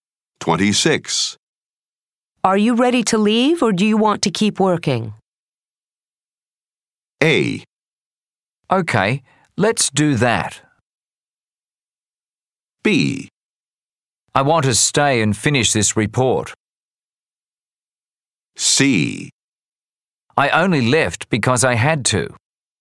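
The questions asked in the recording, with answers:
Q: Are you ready to leave or do you want to keep working?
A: B: I want to stay and finish this report.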